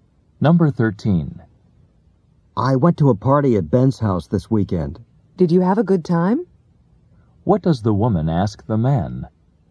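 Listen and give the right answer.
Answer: Whether he enjoyed the party.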